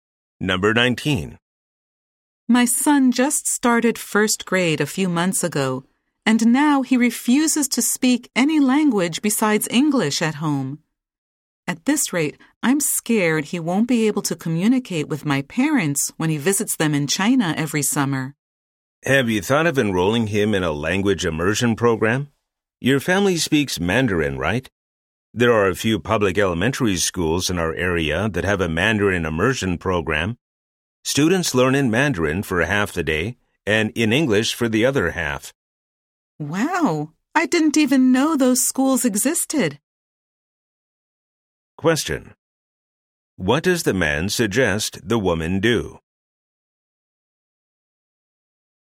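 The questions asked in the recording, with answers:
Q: What does the man suggest the woman do?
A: Enroll her son in a Mandarin immersion program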